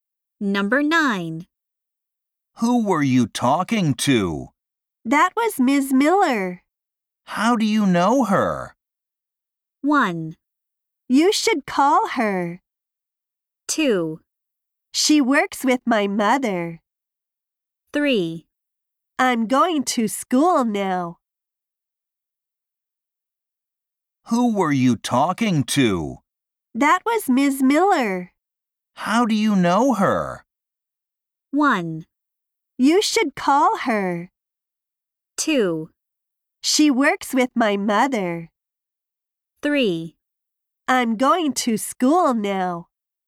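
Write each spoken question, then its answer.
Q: How do you know her?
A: 2: She works with my mother.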